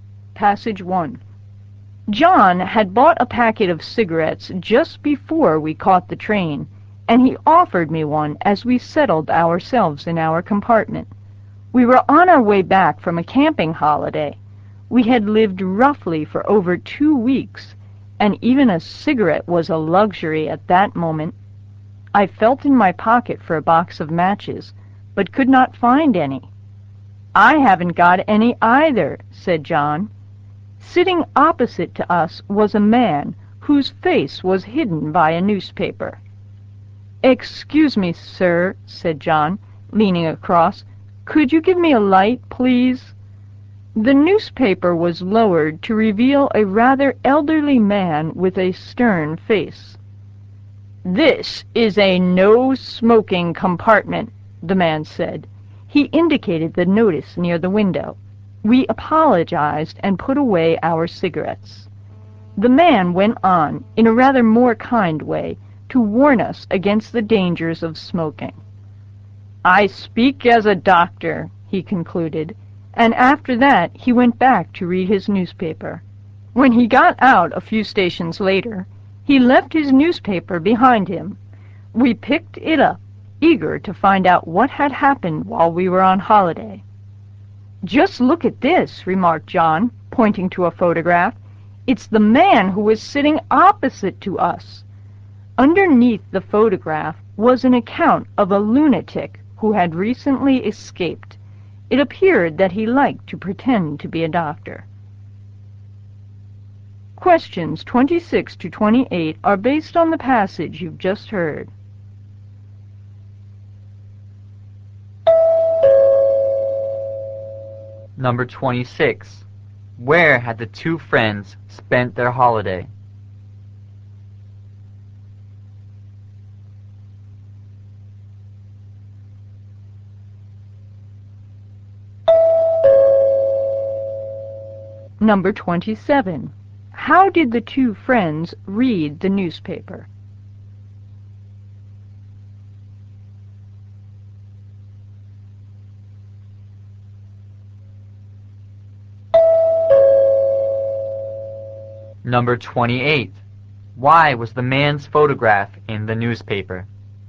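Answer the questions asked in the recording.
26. On a camping holiday
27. The man left it behind when he got off the train
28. He was a lunatic who had recently escaped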